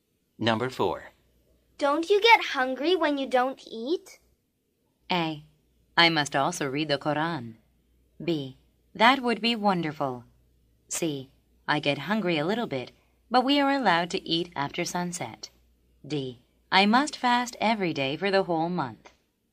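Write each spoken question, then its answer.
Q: Don't you get hungry when you don't eat?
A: C: I get hungry a little bit, but we are allowed to eat after sunset.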